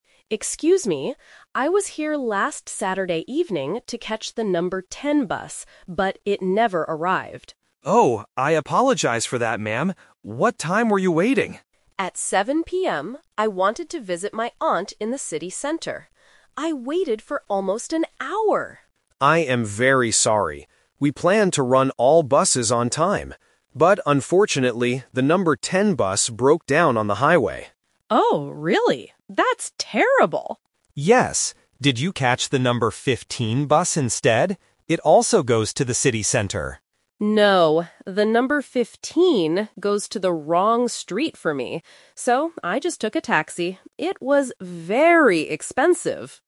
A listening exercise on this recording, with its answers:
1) Where did the passenger want to go on Saturday evening?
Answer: To her aunt's house.

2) Why didn't the number 10 bus arrive?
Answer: Because the bus broke down.

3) How did the passenger finally go to the city center?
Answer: She took a taxi.

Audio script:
Passenger: Excuse me. I was here last Saturday evening to catch the number 10 bus, but it never arrived.
Employee: Oh, I apologize for that, ma'am. What time were you waiting?
Passenger: At 7 PM. I wanted to visit my aunt in the city center. I waited for almost an hour!
Employee: I am very sorry. We planned to run all buses on time. But unfortunately, the number 10 bus broke down on the highway.
Passenger: Oh, really? That's terrible.
Employee: Yes. Did you catch the number 15 bus instead? It also goes to the city center.
Passenger: No, the number 15 goes to the wrong street for me. So, I just took a taxi. It was very expensive!